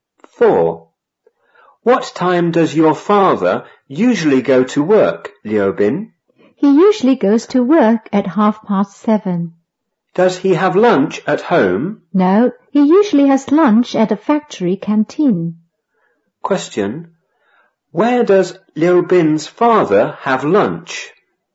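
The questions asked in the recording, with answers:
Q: Question, where does Liu Bin's father have lunch?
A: At a factory canteen.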